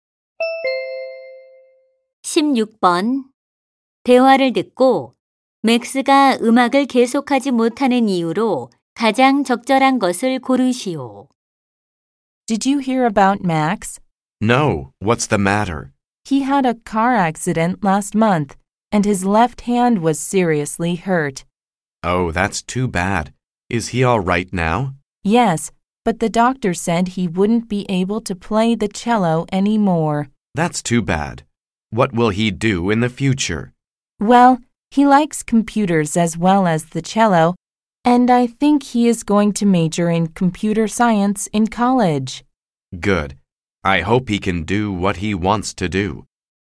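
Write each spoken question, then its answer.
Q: 대화를 듣고 맥스가 음악을 계속하지 못하는 이유로 가장 적절한 것을 고르시오.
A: 교통사고로 왼손을 심하게 다쳐서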